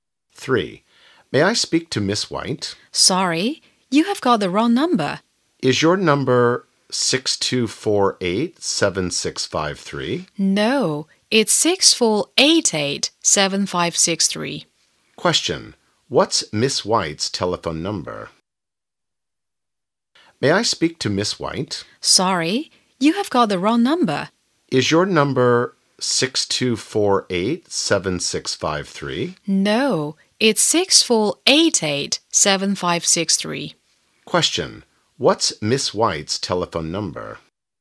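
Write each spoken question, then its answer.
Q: What's Miss White's telephone number?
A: 6488-7563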